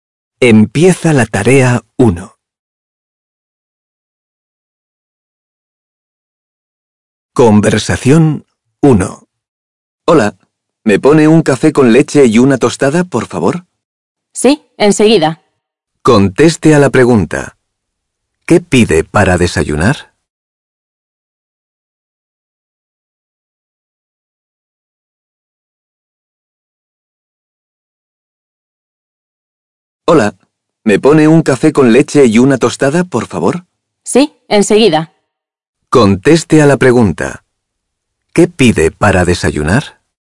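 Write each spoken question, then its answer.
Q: ¿Qué pide para desayunar?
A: Un café con leche y una tostada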